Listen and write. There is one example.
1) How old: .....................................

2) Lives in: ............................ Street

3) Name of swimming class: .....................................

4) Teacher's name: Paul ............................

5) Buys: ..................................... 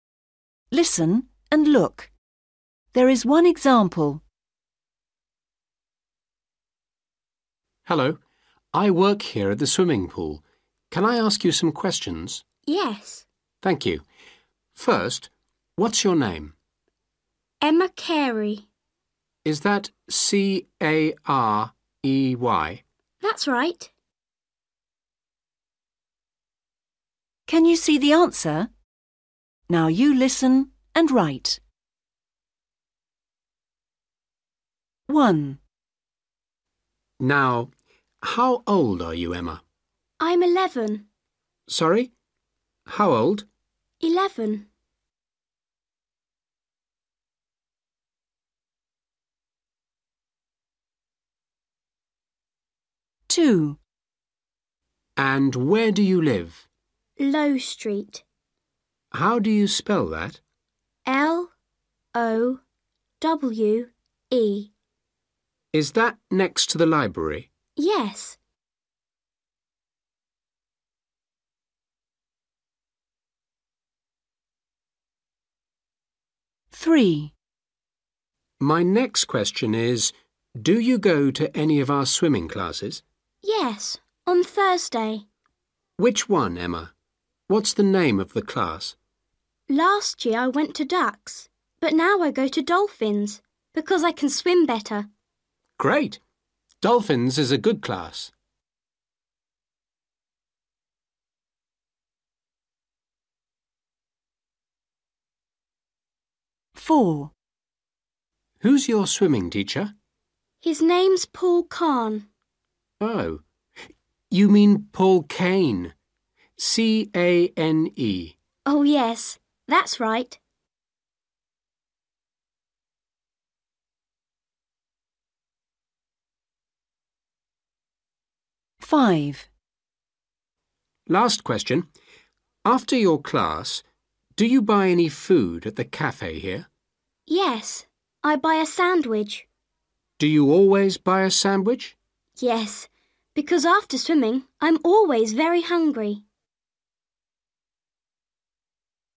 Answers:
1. 11/eleven
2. Lowe
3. Dolphins
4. Cane
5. (a) sandwich

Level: A1